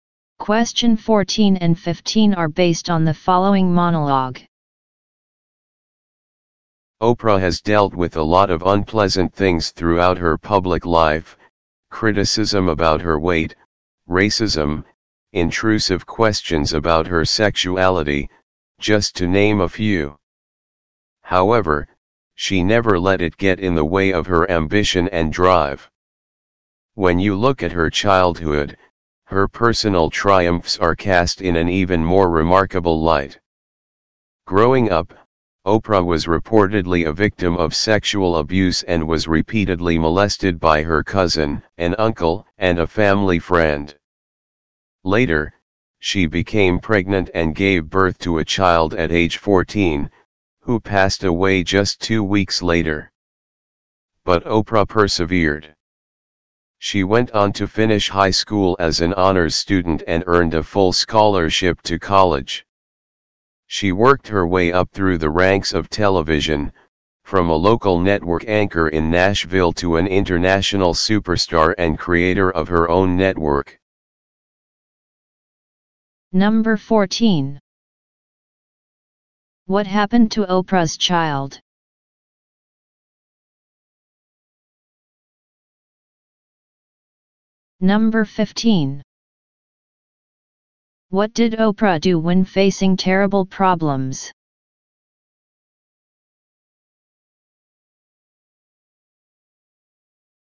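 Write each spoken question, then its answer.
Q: What happened to Oprah's child?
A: The child died two weeks after birth

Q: What did Oprah do when facing terrible problems?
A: She persevered and never let them get in the way of her ambition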